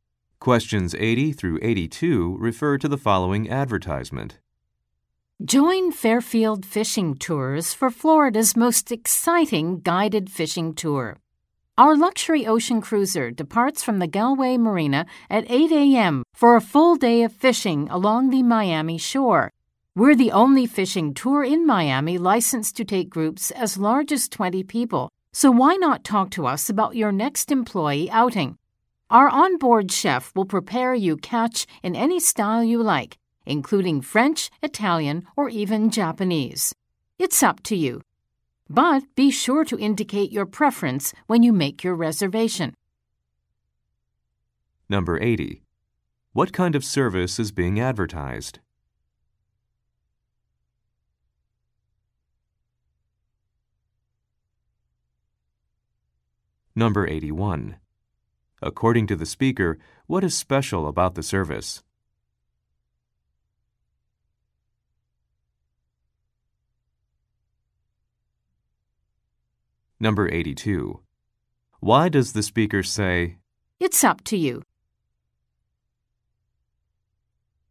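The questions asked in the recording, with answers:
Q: What kind of service is being advertised?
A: A guided fishing tour

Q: According to the speaker, what is special about the service?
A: It is the only one licensed for groups of up to 20 people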